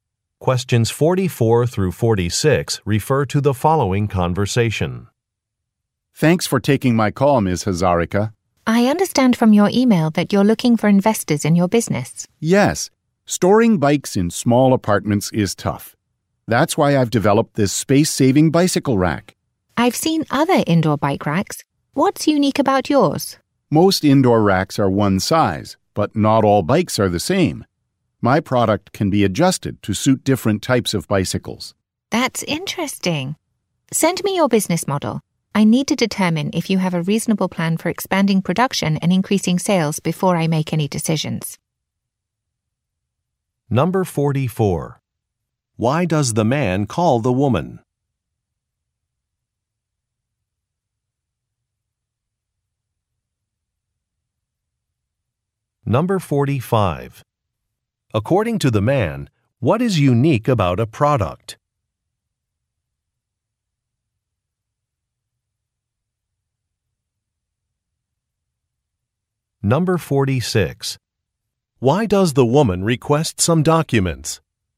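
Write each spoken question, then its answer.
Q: Why does the man call the woman?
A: To discuss investing in her business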